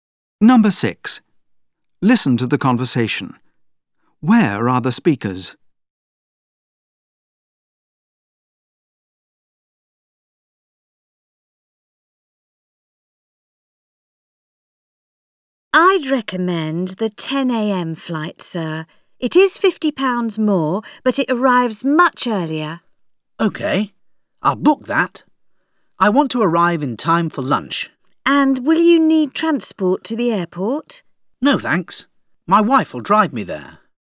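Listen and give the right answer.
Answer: At a travel agent's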